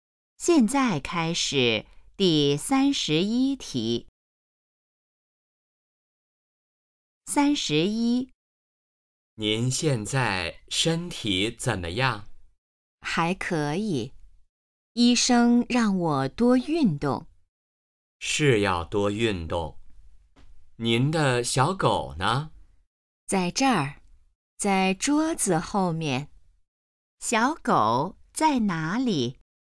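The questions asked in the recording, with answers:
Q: 小狗在哪里?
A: 桌子后面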